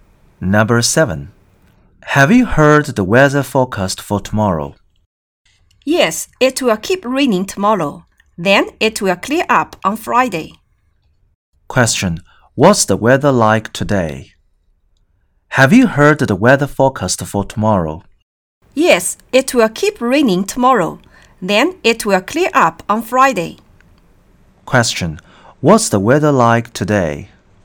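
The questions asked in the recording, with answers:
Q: What's the weather like today?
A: It's rainy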